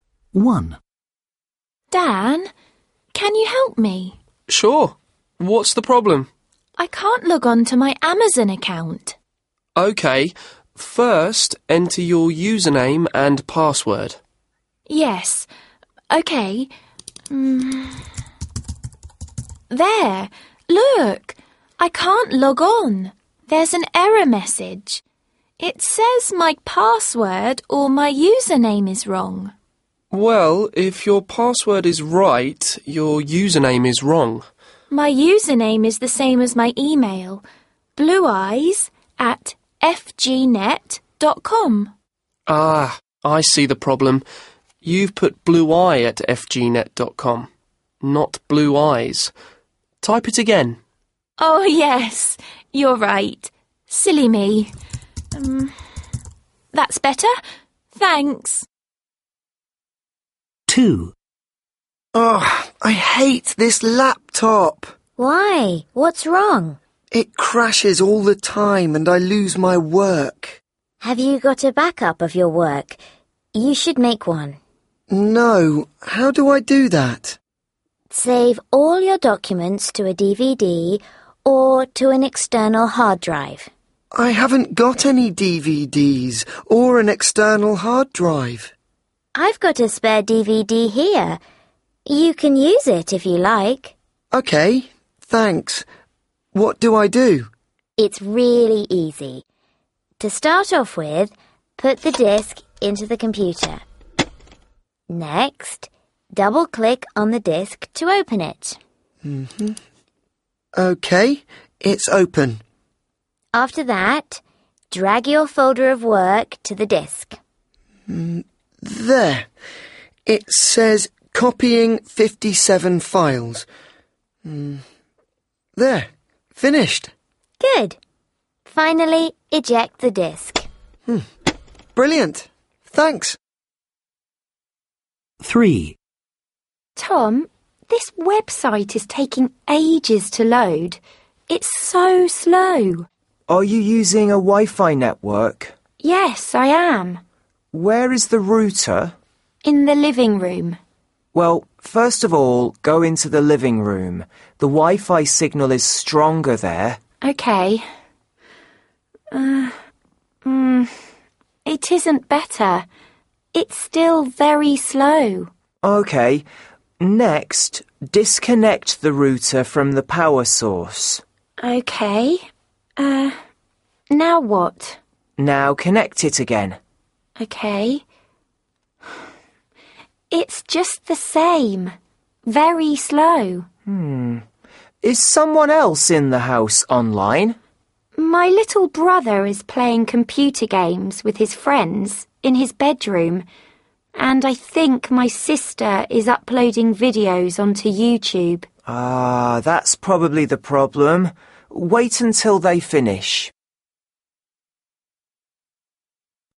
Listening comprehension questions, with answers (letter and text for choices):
3. Listen again. Choose the correct answers.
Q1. The girl can't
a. log on.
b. log out.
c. remember her password.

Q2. There was a spelling mistake in the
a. password.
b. website address.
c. username.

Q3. The boy has a problem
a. with his laptop.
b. with an external hard drive.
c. with his homework.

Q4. The girl lends the boy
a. a DVD.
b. an external hard drive.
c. her laptop.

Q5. The girl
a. can't find the Wi-Fi network.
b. can't get online.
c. finds that the Wi-Fi connection is very slow.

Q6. What is the cause of the problem?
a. Other people are using the network at the same time.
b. The router is broken.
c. The girl needs to be nearer to the router.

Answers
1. a. log on.
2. c. username.
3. a. with his laptop.
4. a. a DVD.
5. c. finds that the Wi-Fi connection is very slow.
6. a. Other people are using the network at the same time.